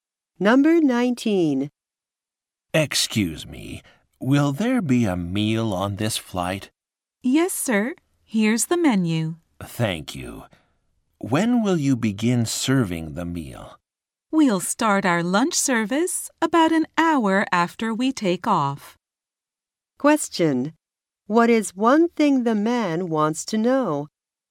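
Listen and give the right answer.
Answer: When the meal will be served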